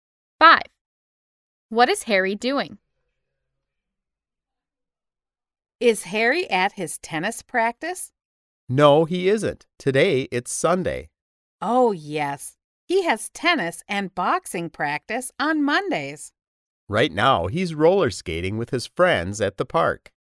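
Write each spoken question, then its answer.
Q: What is Harry doing?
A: roller skating with his friends at the park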